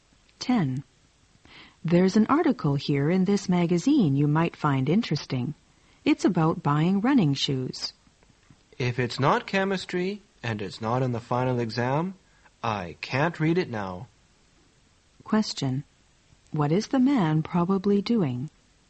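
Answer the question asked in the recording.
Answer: Studying for a chemistry exam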